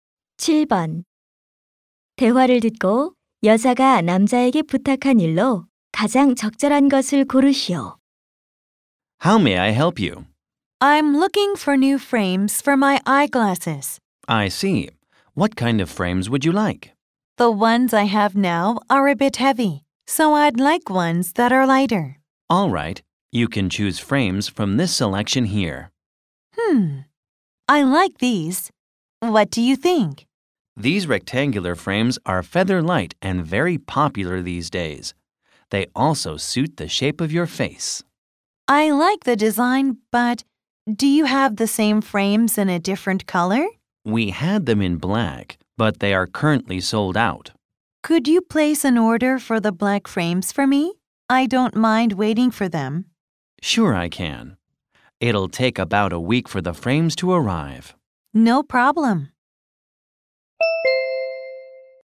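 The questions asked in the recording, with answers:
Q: 대화를 듣고 여자가 남자에게 부탁한 일로 가장 적절한 것을 고르시오.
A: 검은색 안경테 주문하기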